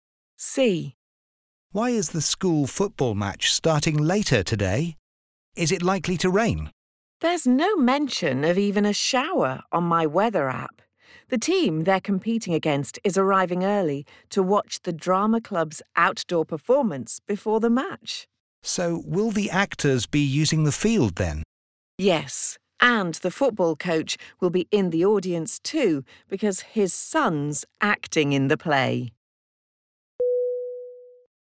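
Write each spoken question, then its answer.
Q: Why is the school football match starting later today?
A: The other team is arriving early to watch the drama club's outdoor performance before the match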